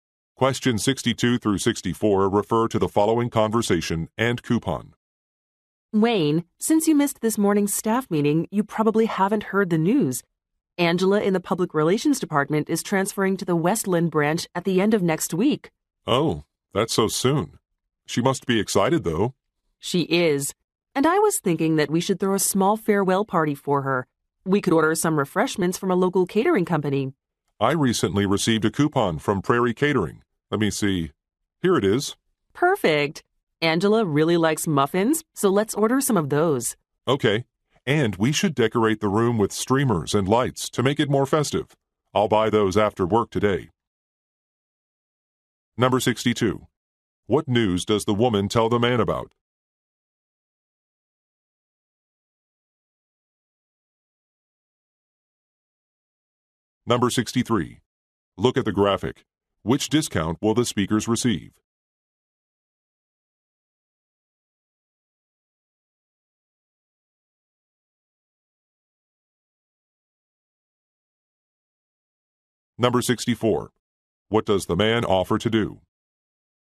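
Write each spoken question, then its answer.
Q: What news does the woman tell the man about?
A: A coworker is transferring to another branch

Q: What does the man offer to do?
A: Buy decorations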